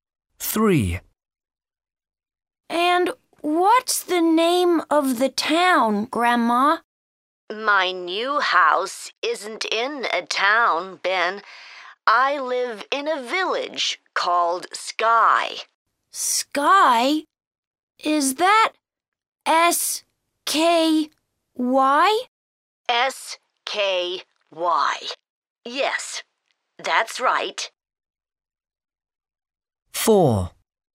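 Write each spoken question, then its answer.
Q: And what's the name of the town, Grandma?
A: Sky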